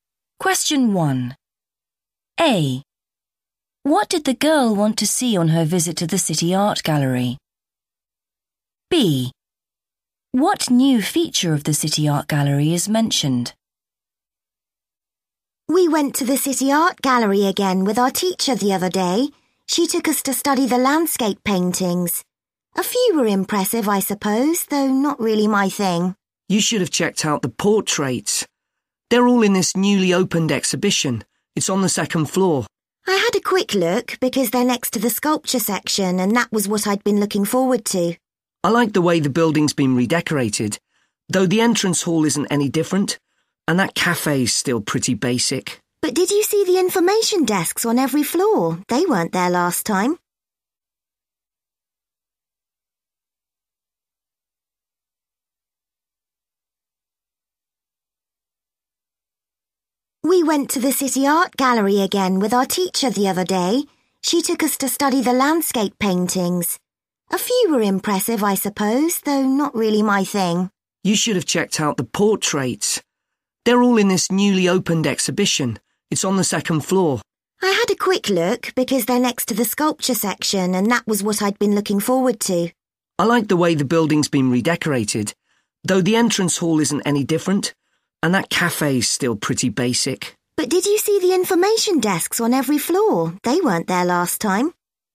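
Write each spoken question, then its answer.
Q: What did the girl want to see on her visit to the City Art Gallery?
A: the sculptures (sculpture section)

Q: What new feature of the City Art Gallery is mentioned?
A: information desks on every floor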